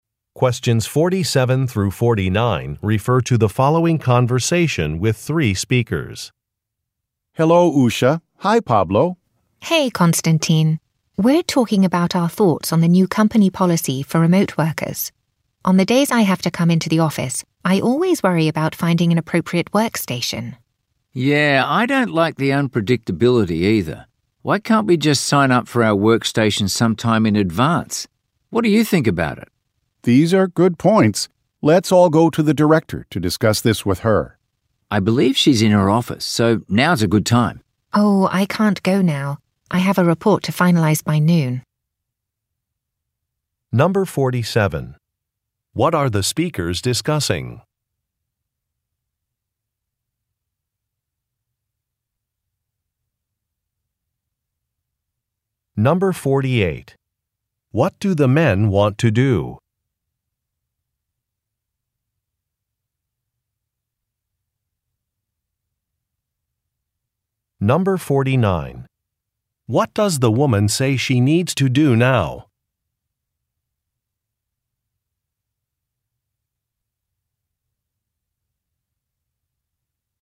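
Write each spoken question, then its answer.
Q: What are the speakers discussing?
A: A new company policy for remote workers

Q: What does the woman say she needs to do now?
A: Finalize a report by noon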